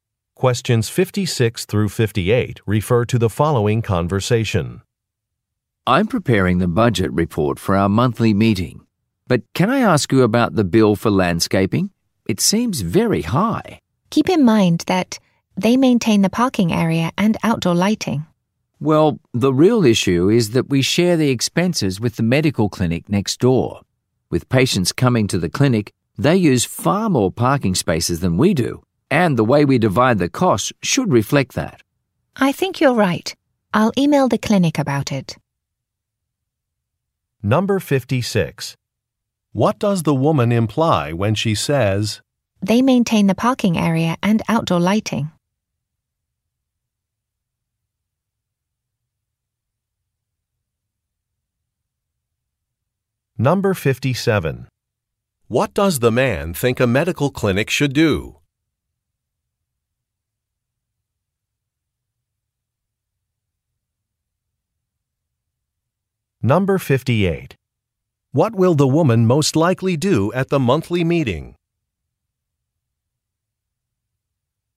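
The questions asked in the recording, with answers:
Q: What does the woman imply when she says,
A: The high bill is justified

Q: What does the man think a medical clinic should do?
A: Pay a larger share of the costs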